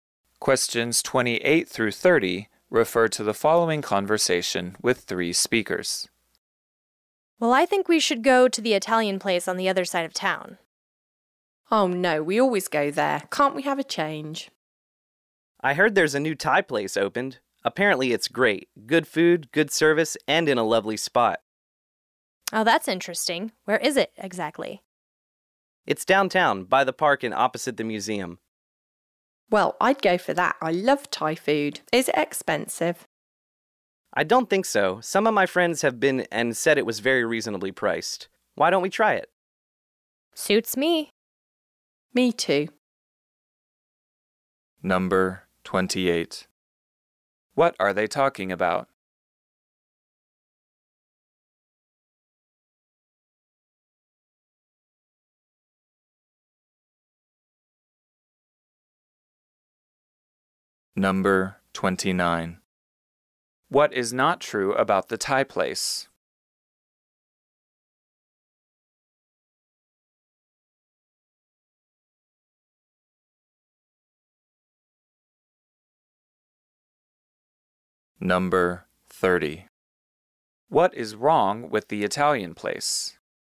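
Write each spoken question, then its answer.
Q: What are they talking about?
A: Which restaurant to go to for a meal

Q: What is wrong with the Italian place?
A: They always go there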